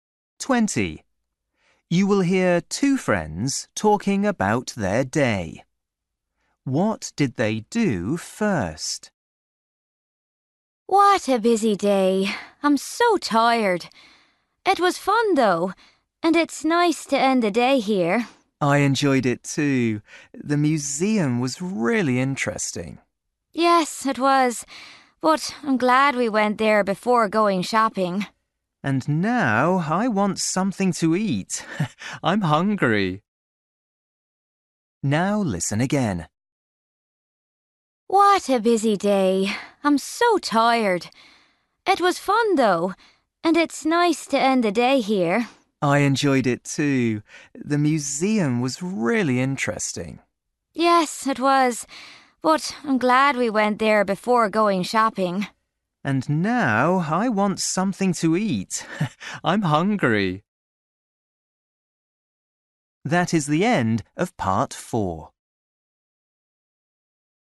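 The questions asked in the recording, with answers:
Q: What did they do first?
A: They went to the museum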